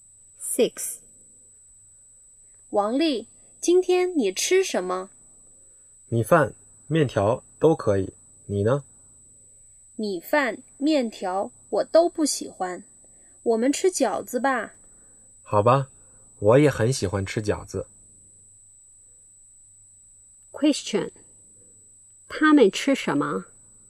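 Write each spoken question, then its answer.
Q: 他们吃什么?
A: 饺子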